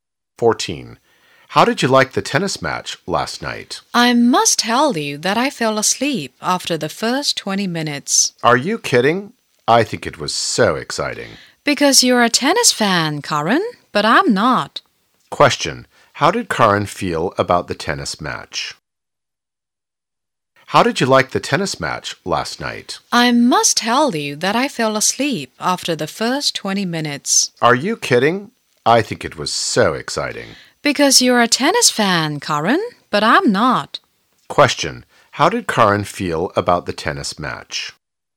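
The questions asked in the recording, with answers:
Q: How did Karen feel about the tennis match?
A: She thought it was very exciting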